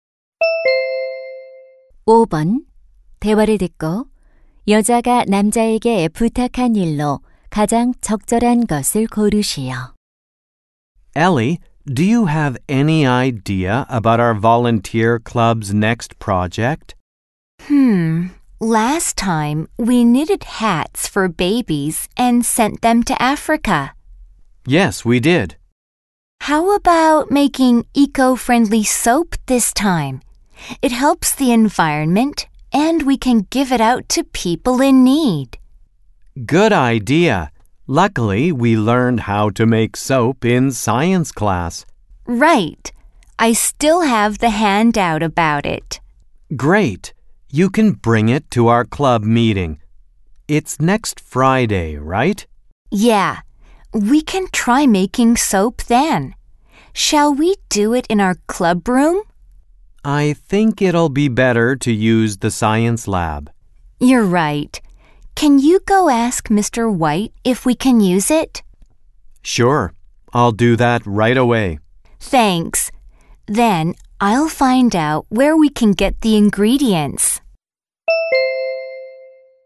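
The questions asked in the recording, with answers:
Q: 대화를 듣고 여자가 남자에게 부탁한 일로 가장 적절한 것을 고르시오.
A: White 선생님께 과학실 사용 허락 받기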